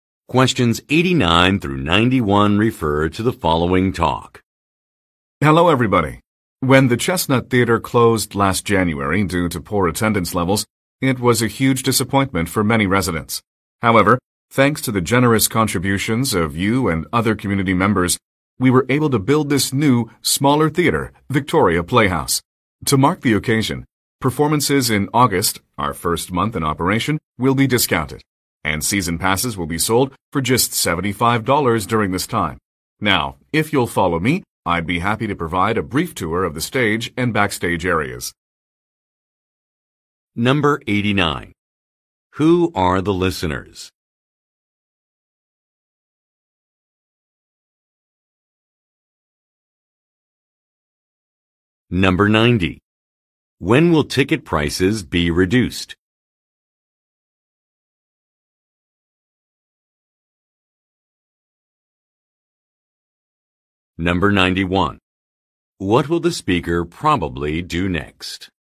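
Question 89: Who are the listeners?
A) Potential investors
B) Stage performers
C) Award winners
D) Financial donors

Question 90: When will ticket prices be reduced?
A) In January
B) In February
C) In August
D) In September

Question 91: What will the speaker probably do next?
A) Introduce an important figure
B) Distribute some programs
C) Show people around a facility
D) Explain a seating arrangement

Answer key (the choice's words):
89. Financial donors
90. In August
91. Show people around a facility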